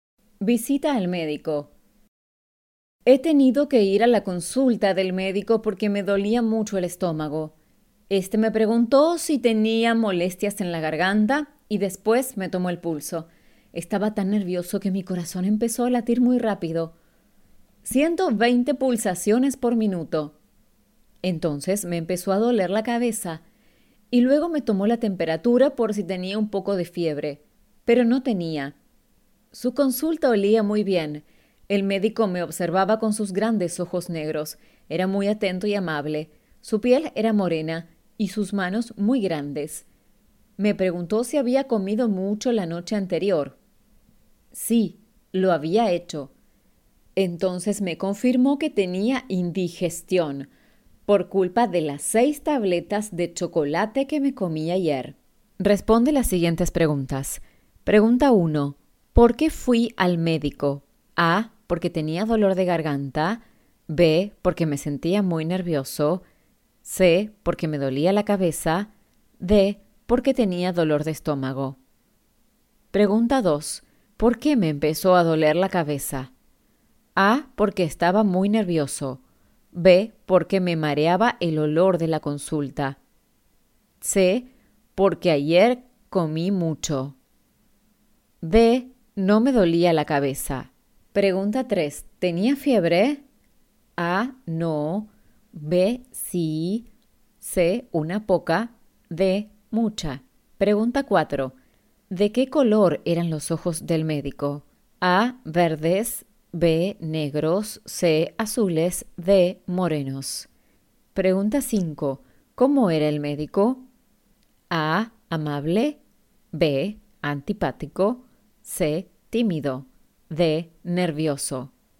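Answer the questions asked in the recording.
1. D: Porque tenía dolor de estómago.
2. A: Porque estaba muy nervioso.
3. A: No.
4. B: Negros.
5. A: Amable.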